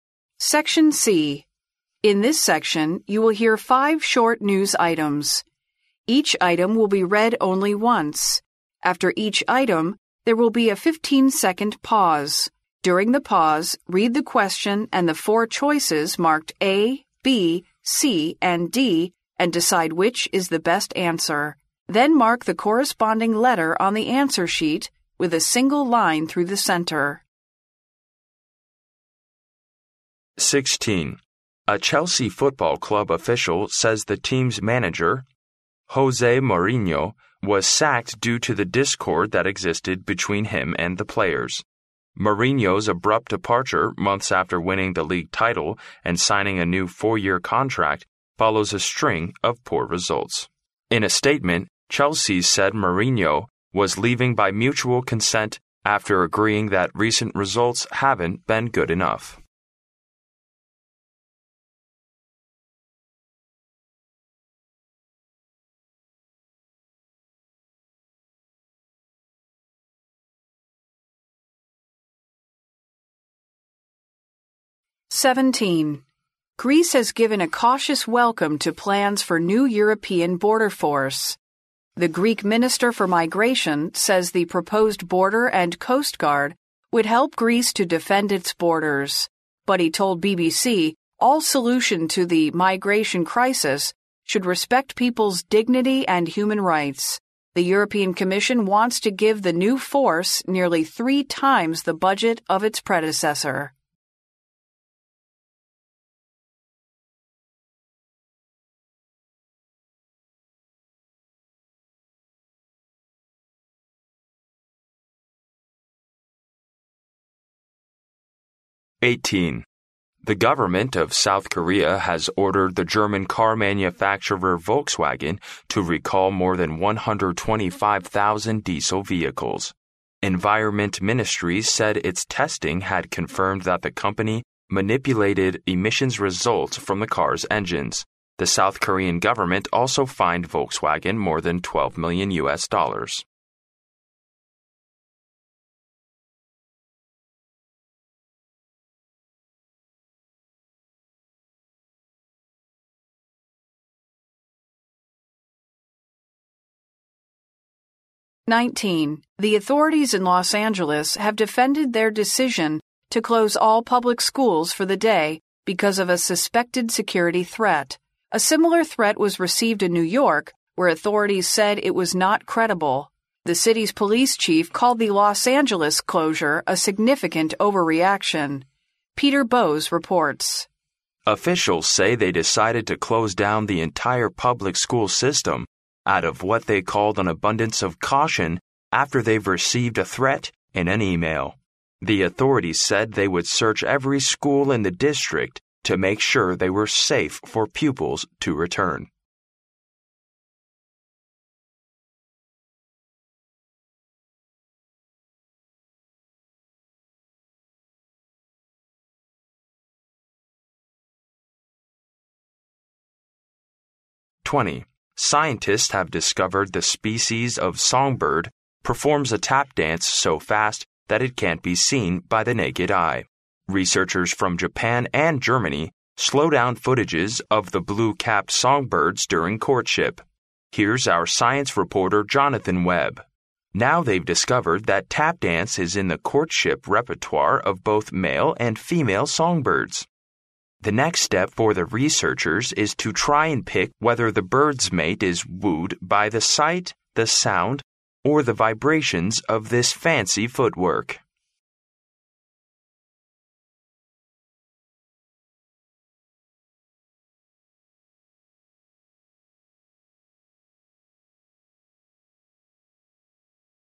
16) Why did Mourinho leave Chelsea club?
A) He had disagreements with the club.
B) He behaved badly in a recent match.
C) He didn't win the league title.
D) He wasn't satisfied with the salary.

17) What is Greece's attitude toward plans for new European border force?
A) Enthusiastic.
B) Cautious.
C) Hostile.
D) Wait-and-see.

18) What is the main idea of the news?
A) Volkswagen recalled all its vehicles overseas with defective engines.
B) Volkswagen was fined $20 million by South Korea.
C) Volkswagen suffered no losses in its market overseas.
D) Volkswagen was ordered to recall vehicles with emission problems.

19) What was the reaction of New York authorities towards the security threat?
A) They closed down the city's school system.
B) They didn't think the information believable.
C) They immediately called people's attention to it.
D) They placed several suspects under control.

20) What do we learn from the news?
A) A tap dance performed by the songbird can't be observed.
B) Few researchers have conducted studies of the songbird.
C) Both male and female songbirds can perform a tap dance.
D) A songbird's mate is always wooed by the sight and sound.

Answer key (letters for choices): 16A, 17B, 18D, 19B, 20C

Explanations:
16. 新闻中谈到穆里尼奥被切尔西俱乐部解雇的原因时,提到"due to the discord that existed between him and the players",由此可知,他被解雇是因为与俱乐部球员之间的不合。因此选择A项。
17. 新闻第一句中就说到"Greece has given a cautious welcome to plans for new European border force(希腊对新的欧洲边境部队计划表示谨慎的欢迎)"。因此选择B项。
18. 新闻中谈到韩国政府在测试大众汽车时发现,大众在其引擎排放物报告结果中造假,排放物结果不合格,勒令大众召回车辆。因此选择D项。
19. 新闻中谈到在收到威胁信息时,纽约当局认为这是不可信的。因此选择B项。
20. 根据新闻内容可知,鸣鸟在求爱中跳的踢踏舞速度太快,肉眼看不到,但是通过技术处理,仍可观察。新闻后面提到,雄鸟和雌鸟都会跳。因此选择C项。

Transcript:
In this section, you will hear five short news items. Each item will be read only once. After each item, there will be a fifteen-second pause. During the pause, read the question and the four choices marked A, B, C and D, and decide which is the best answer. Then mark the corresponding letter on the answer sheet with a single line through the centre.
【录音原文】 A Chelsea football club official says the team's manager José Mourinho was sacked due to the discord that existed between him and the players. Mourinho's abrupt departure months after winning the league title and signing a new four-year contract follows a string of poor results. In a statement, Chelsea said Mourinho was leaving by mutual consent after agreeing that recent results haven't been good enough.
17 What is Greece's attitude toward plans for new European border force?
【录音原文】 Greece has given a cautious welcome to plans for new European border force. The Greek minister for migration says the proposed border and coastguard would help Greece to defend its borders. But he told BBC all solution to the migration crisis should respect people's dignity and human rights. The European Commission wants to give the new force nearly 3 times the budget of its predecessor.
18 What is the main idea of the news?
【录音原文】 The government of South Korea has ordered the German car manufacturer Volkswagen to recall more than 125,000 diesel vehicles. Environment ministry said its testing had confirmed that the company manipulated emissions results from the cars' engines. The South Korean government also fined Volkswagen more than $12 million.
19 What was the reaction of New York authorities towards the security threat?
【录音原文】 The authorities in Los Angeles have defended their decision to close all public schools for the day because of a suspected security threat. A similar threat was received in New York where the authorities said it was not credible. The city's police chief called the Los Angeles' closure a significant overreaction. Peter Bowes reports: "Officials say they decided to close down the entire public school system out of what they called an abundance of caution after they've received a threat in an email. The authority said they would search every school in the district to make sure they were safe for pupils to return."
【录音原文】 Scientists have discovered the species of songbird performs a tap dance so fast that it can't be seen by the naked eye. Researchers from Japan and Germany slow down footages of the blue capped songbirds during courtship. Here's our science reporter Jonathan Web. "Now, they've discovered that tap dance is in the courtship repertoire of both male and female songbirds. The next step for the researchers is to try and pick whether the birds mate is wooed by the sight, the sound or the vibrations of this fancy foot work."